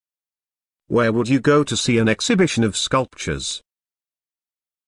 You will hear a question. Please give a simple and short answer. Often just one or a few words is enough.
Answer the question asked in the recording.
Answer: An art gallery/A museum